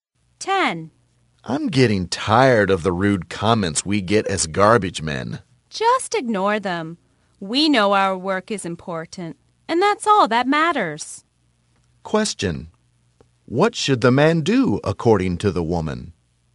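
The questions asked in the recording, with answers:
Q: what should the man do according to the woman?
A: Ignore the rude comments.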